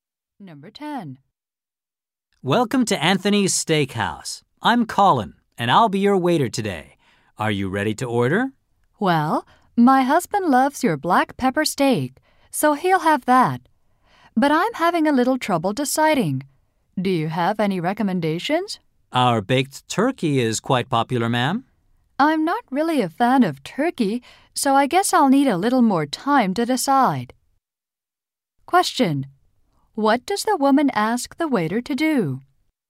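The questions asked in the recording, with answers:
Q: What does the woman ask the waiter to do?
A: Recommend a dish.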